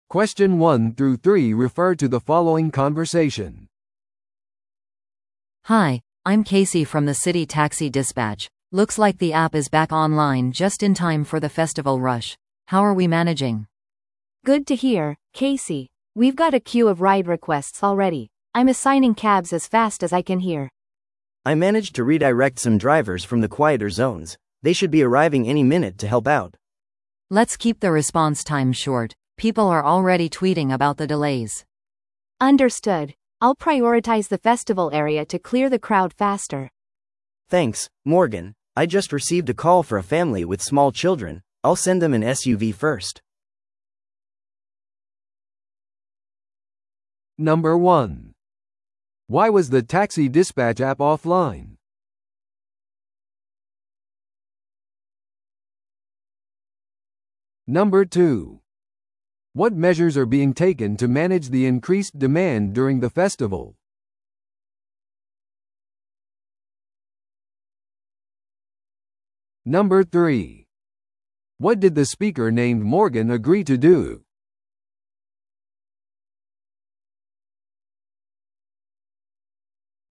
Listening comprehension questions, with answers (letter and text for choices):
Listen to the audio below and answer the questions.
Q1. What measures are being taken to manage the increased demand during the festival?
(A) 静かな地域からドライバーを方向転換させている。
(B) ディスパッチシステムをアップグレードしている。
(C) 問題が解決するまでお祭りを延期している。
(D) 公共交通機関の利用をお客様に奨励している。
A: (A) 静かな地域からドライバーを方向転換させている。

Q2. What did the speaker named Morgan agree to do?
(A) アプリの機能を確認する。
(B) お祭りエリアのサービスに集中する。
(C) システムが安定するまで休憩を取る。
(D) ソーシャルメディアで更新を投稿する。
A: (B) お祭りエリアのサービスに集中する。

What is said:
A: Hi, I'm Casey from the City Taxi Dispatch. Looks like the app is back online just in time for the festival rush, how are we managing?
B: Good to hear, Casey. We've got a queue of ride requests already. I'm assigning cabs as fast as I can here.
C: I managed to redirect some drivers from the quieter zones. They should be arriving any minute to help out.
A: Let's keep the response time short, people are already tweeting about the delays.
B: Understood. I'll prioritize the festival area to clear the crowd faster.
C: Thanks, Morgan. I just received a call for a family with small children. I'll send them an SUV first.